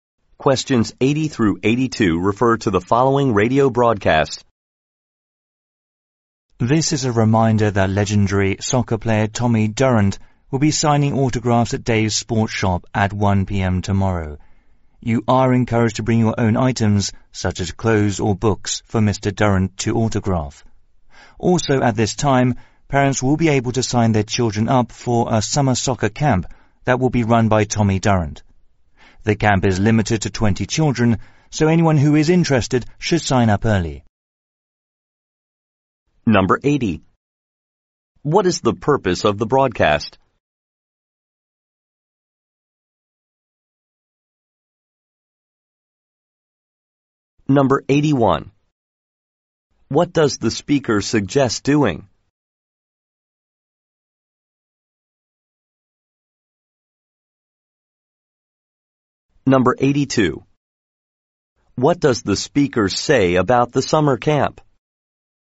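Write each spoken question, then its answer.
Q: What is the purpose of the broadcast?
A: To announce an autograph signing by Tommy Durrant

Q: What does the speaker suggest doing?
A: Bringing your own items to be autographed

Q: What does the speaker say about the summer camp?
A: It is limited to 20 children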